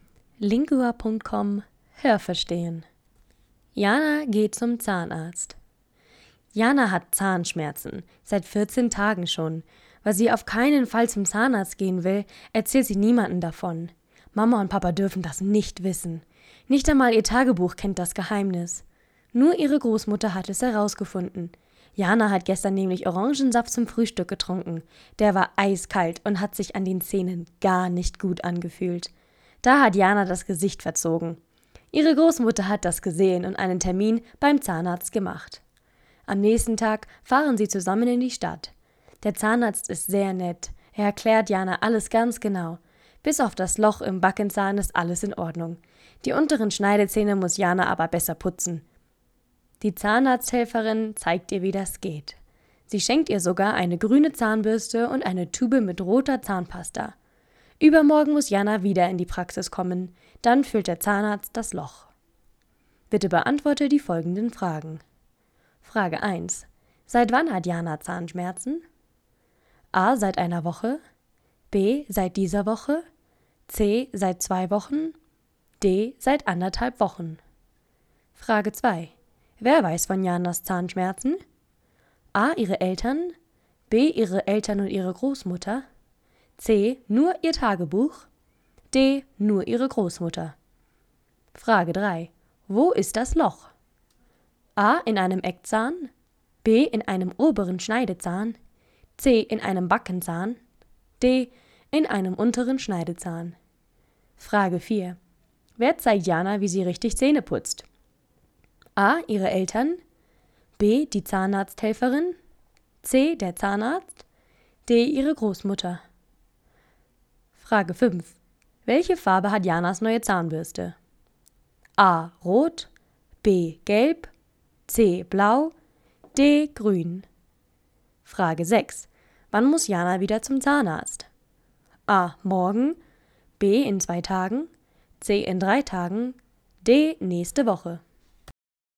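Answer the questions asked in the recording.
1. C: Seit 2 Wochen.
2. D: Nur ihre Großmutter.
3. C: In einem Backenzahn.
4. B: Die Zahnarzthelferin.
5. D: Grün.
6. B: In 2 Tagen.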